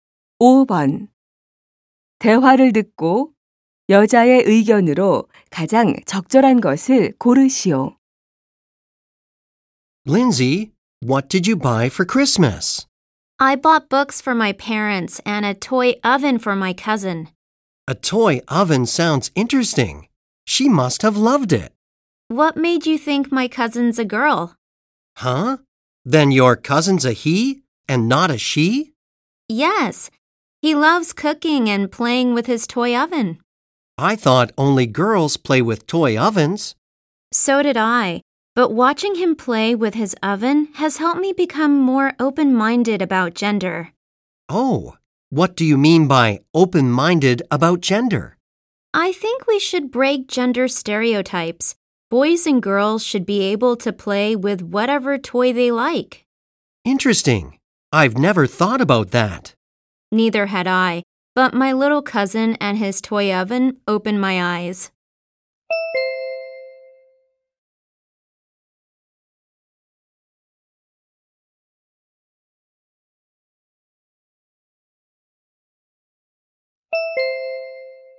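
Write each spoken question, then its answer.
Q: 대화를 듣고 여자의 의견으로 가장 적절한 것을 고르시오.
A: 성 고정관념을 깨고 아이들이 원하는 장난감을 가지고 놀게 해야 한다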